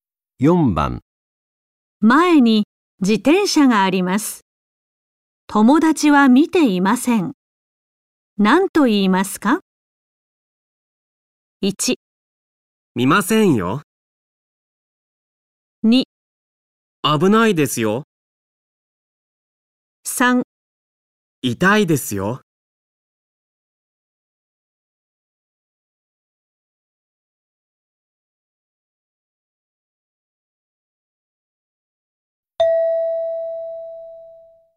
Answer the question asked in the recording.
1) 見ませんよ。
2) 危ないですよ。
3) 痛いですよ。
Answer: 2) 危ないですよ。

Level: N5 Listening · Test 1